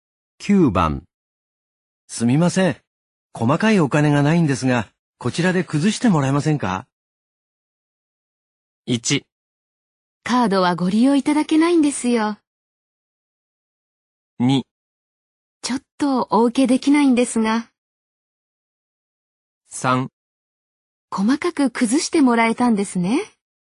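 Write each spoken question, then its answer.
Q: すみません。細かいお金がないんですが、こちらで崩してもらえませんか?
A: 2: ちょっとお受けできないんですが。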